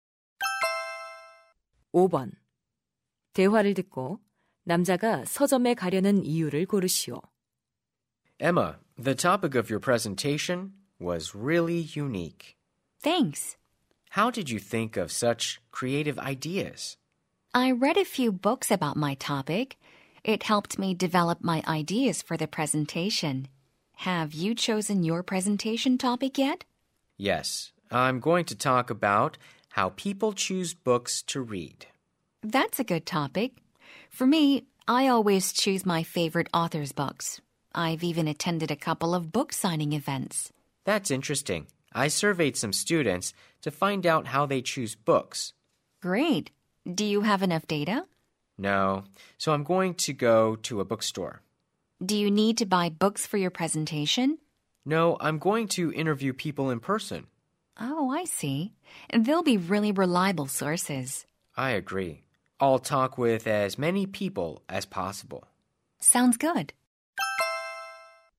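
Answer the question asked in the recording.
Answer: 발표를 위해 사람들을 직접 인터뷰하려고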